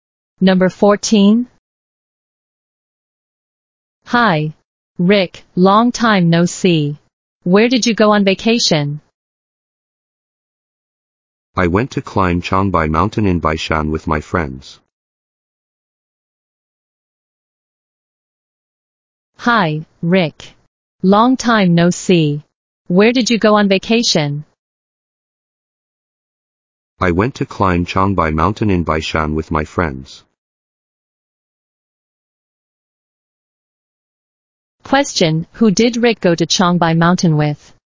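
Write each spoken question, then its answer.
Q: who did Rick go to Changbai Mountain with?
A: His friends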